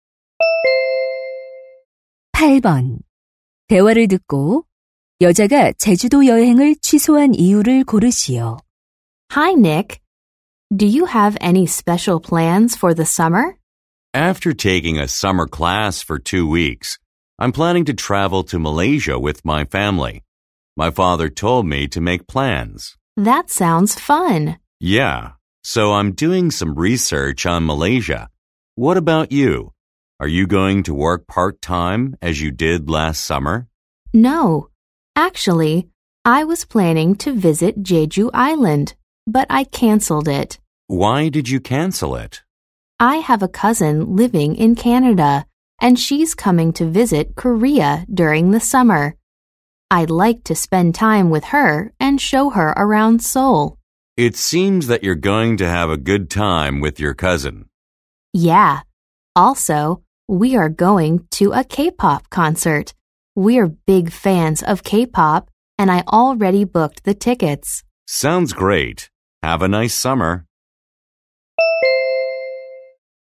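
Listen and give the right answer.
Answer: 캐나다에 사는 사촌이 한국을 방문해서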